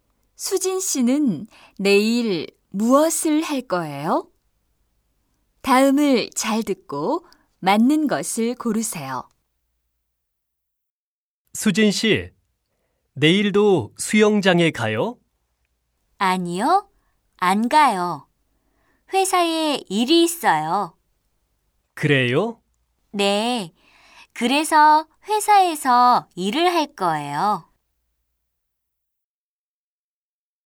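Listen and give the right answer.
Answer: 회사에서 일을 할 거예요.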